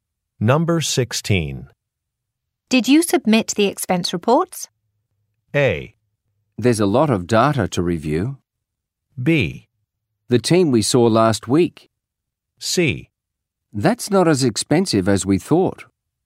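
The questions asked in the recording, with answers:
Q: Did you submit the expense reports?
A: A: There's a lot of data to review.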